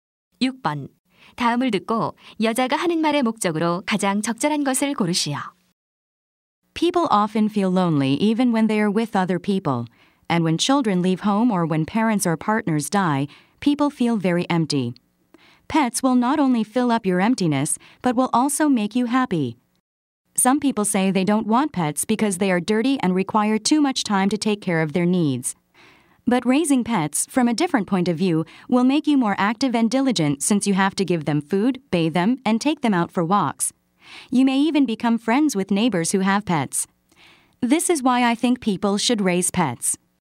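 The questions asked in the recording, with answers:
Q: 다음을 듣고 여자가 하는 말의 목적으로 가장 적절한 것을 고르시오.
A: 애완동물 기르기를 권장하려고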